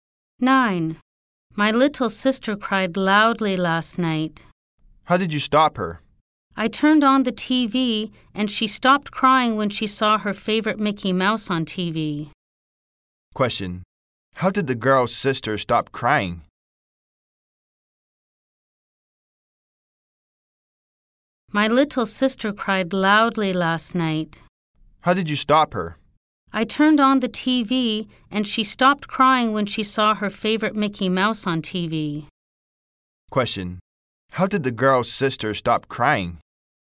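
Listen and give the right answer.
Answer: She saw Mickey Mouse on TV.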